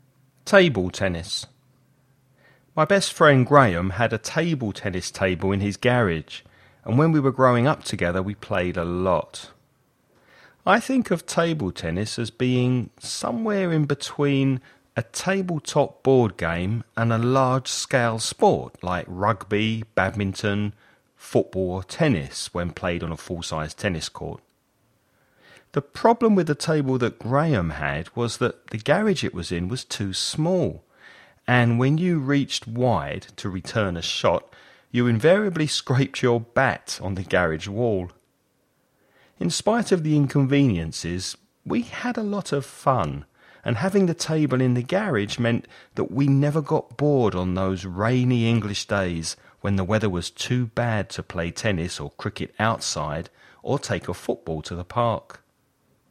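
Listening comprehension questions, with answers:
Listen and write the questions you hear.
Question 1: Where was Graham's table tennis table?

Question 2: If football is played on a pitch and table tennis is played on a table, where is tennis played?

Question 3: What was the problem with Graham's garage?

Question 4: What would sometimes happen to the table tennis bat if the ball was played wide?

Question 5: Which three sports would the speaker play with his friend when the weather was nice?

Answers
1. In his garage
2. On a tennis court
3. It was too small
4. It scraped on the garage wall
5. Tennis, cricket and football

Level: nivel intermedio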